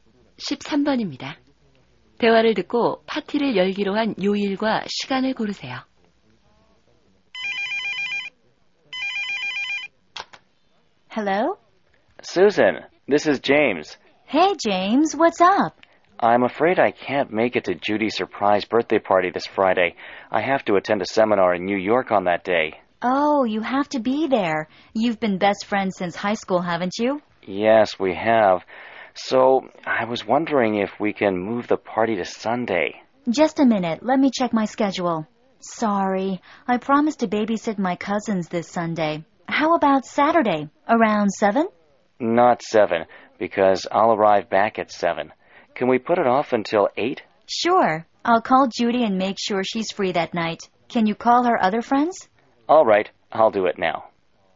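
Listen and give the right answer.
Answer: 토요일 8시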